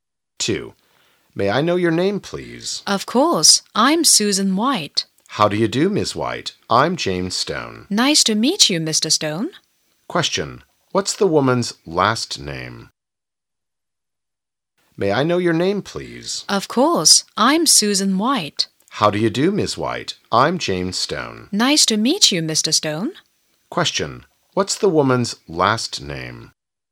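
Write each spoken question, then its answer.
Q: What's the woman's last name?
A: White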